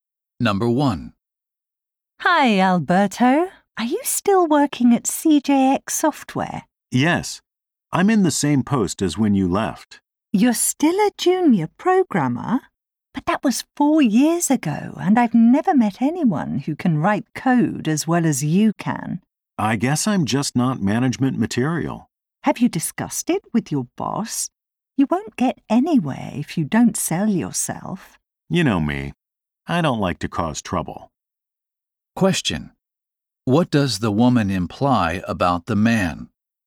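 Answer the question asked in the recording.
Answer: He should promote himself to his boss to get promoted; he is too passive.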